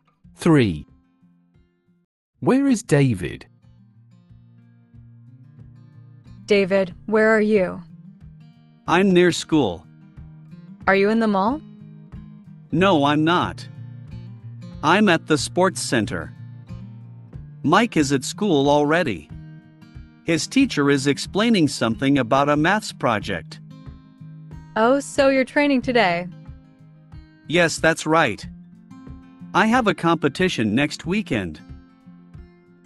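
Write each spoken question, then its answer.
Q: Where is David?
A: At the sports center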